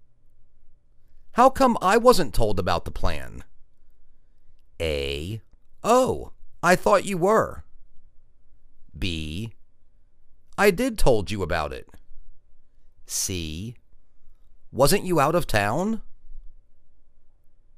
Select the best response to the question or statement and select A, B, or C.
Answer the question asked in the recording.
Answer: Oh. I thought you were.